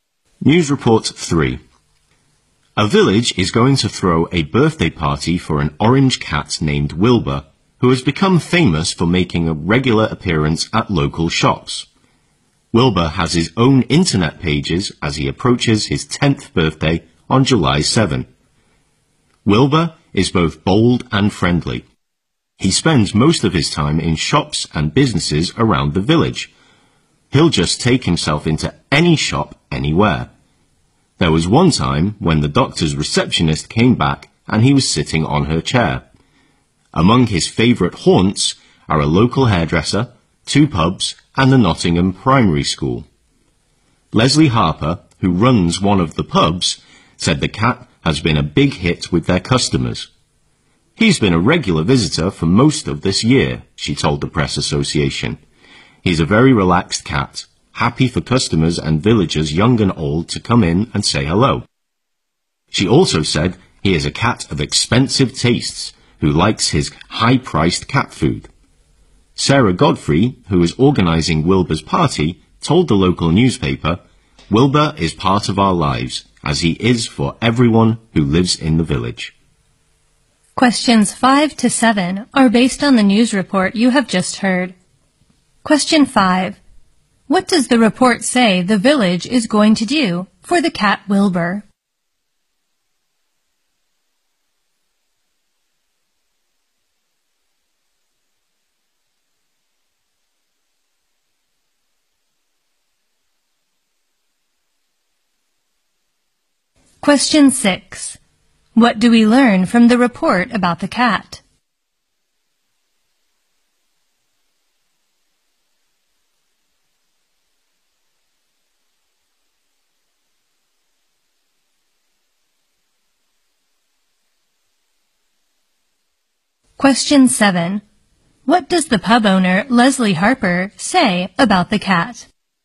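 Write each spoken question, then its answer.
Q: What does the report say the village is going to do for the cat Wilbur?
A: Throw a birthday party for him.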